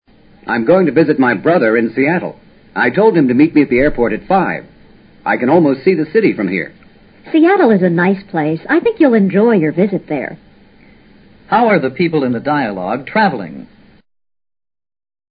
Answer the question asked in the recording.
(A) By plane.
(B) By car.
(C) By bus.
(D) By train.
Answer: (A) By plane.

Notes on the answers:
I told him to meet me at the airport提供了足够判断的信息。Seattle: 西雅图,美国西北,太平洋沿岸的港市。